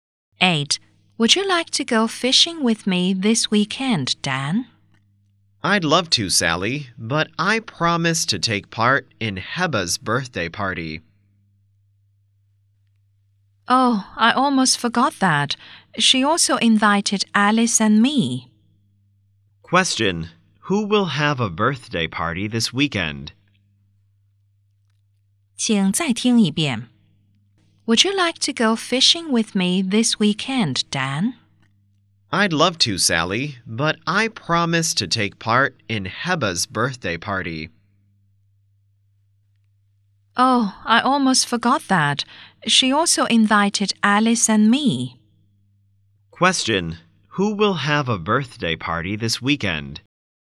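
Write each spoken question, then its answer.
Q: Who will have a birthday party this weekend?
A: Heba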